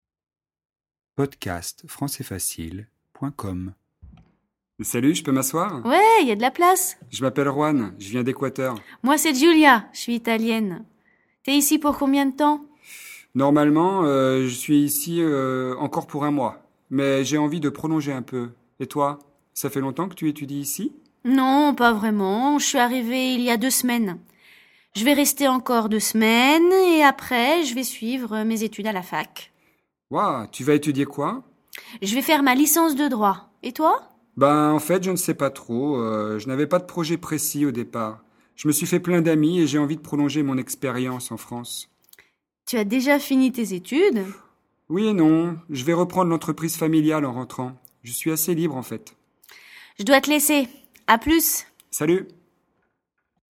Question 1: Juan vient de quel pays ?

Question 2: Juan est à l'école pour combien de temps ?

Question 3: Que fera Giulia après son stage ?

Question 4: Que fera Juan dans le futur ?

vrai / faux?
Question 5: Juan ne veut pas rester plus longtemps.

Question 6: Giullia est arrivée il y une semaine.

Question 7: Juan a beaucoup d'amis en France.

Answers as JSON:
{"1": "Il vient d'Equateur.", "2": "Il y est pour un mois.", "3": "Elle fera sa licence de droit.", "4": "Il reprendra l'entreprise familiale.", "5": "faux", "6": "faux", "7": "vrai"}

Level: niveau débutant (A1)